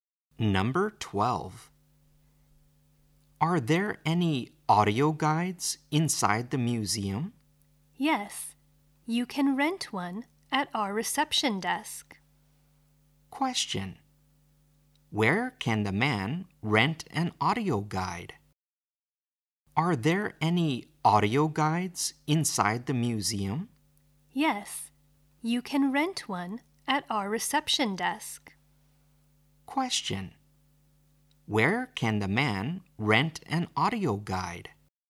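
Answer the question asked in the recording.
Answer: At the reception desk.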